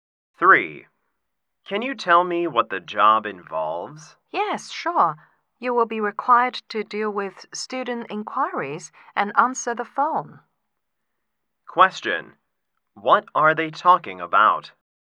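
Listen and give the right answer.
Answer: A job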